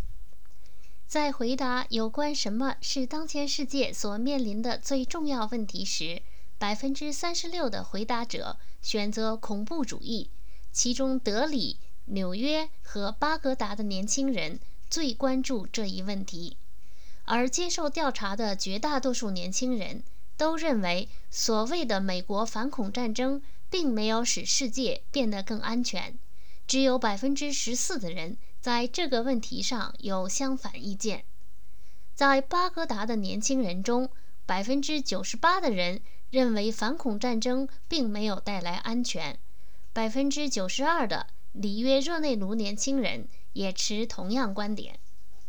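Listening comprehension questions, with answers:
Please answer the following questions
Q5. 有多少年轻人认为反恐战争使世界变得更安全了?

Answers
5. 14%

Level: 3rd Year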